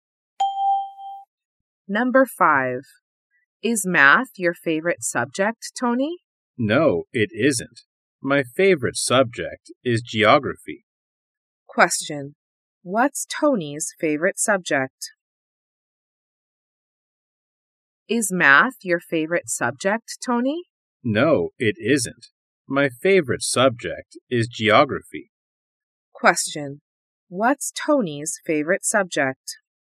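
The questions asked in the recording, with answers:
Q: What's Tony's favorite subject?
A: Geography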